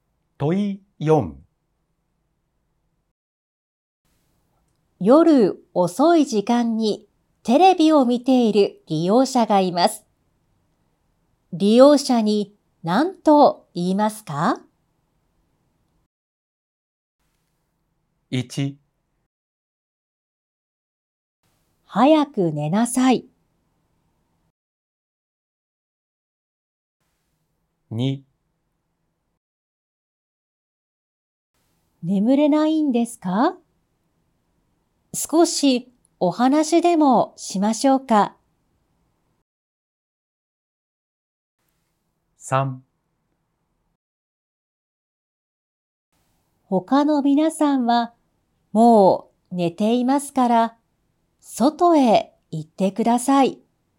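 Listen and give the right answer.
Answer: 2: 眠れないんですか?少しお話でもしましょうか。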